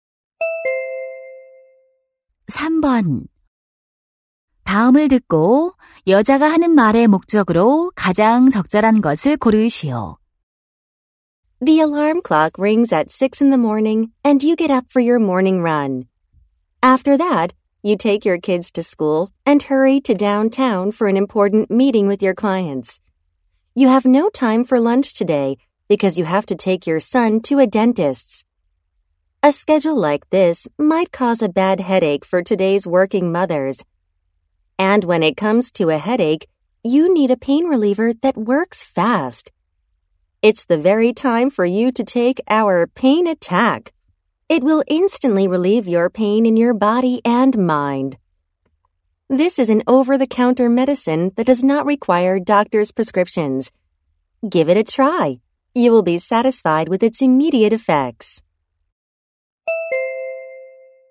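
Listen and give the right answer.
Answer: 진통제를 광고하려고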